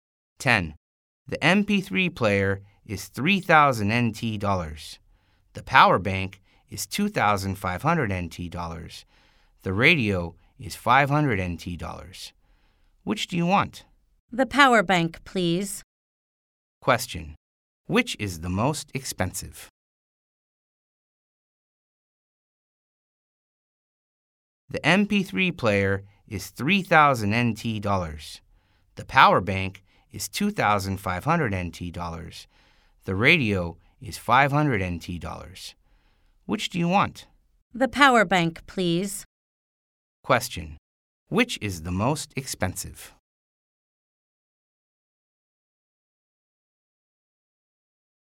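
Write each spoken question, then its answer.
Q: Which is the most expensive?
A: The MP3 player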